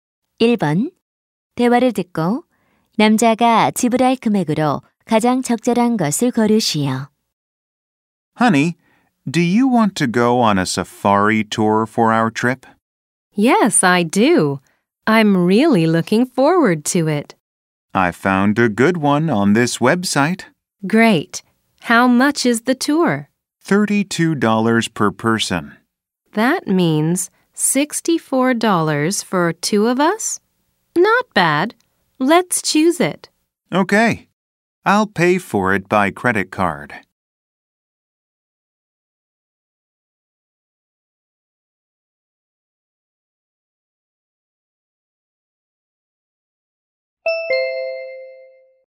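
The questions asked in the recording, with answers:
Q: 대화를 듣고 남자가 지불할 금액으로 가장 적절한 것을 고르시오.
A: $64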